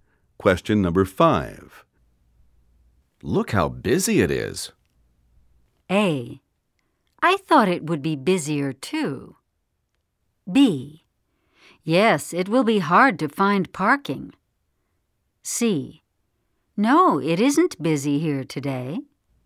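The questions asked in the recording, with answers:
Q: Look how busy it is.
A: B: Yes, it will be hard to find parking.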